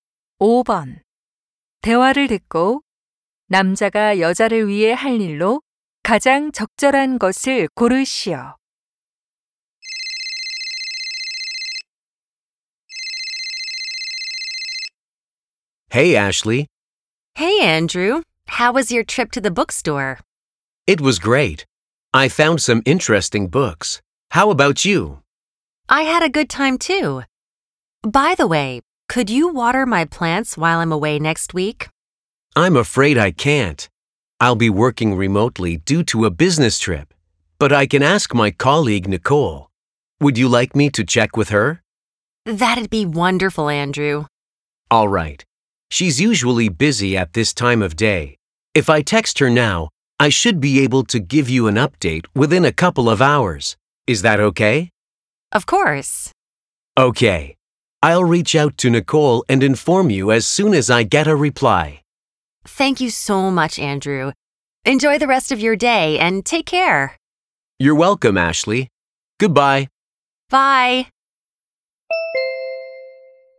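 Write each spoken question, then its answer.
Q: 대화를 듣고 남자가 여자를 위해 할 일로 가장 적절한 것을 고르시오.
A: 동료 Nicole에게 식물에 물을 줄 수 있는지 문자로 물어보기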